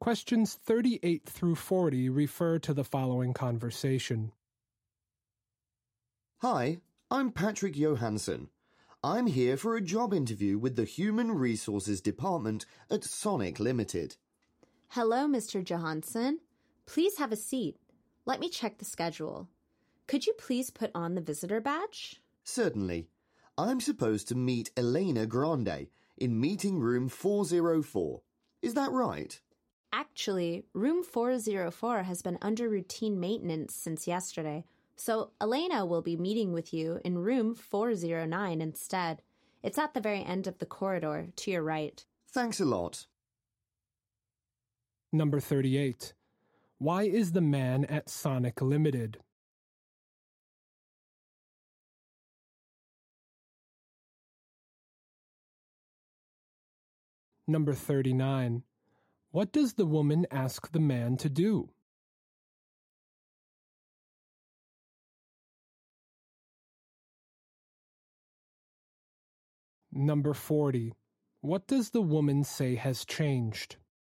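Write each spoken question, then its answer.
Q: Why is the man at Sonic Limited?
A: For a job interview

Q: What does the woman ask the man to do?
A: Put on a visitor badge

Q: What does the woman say has changed?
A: The meeting room (404 to 409)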